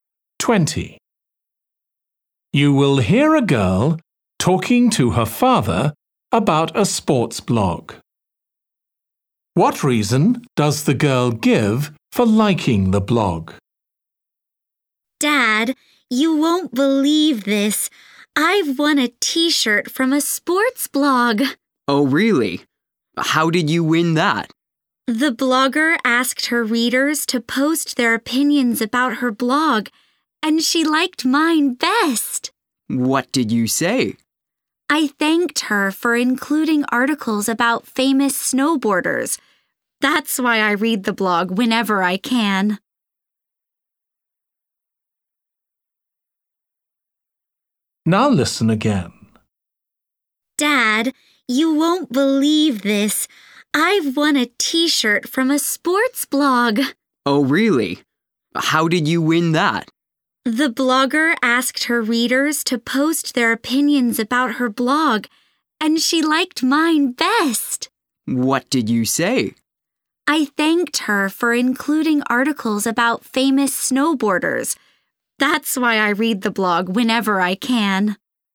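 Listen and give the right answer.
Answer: It has articles about famous snowboarders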